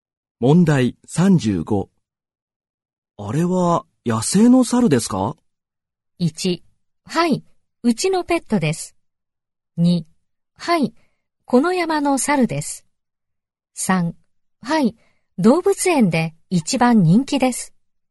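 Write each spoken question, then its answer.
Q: あれは野生の猿ですか?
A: 2: はい、この山の猿です。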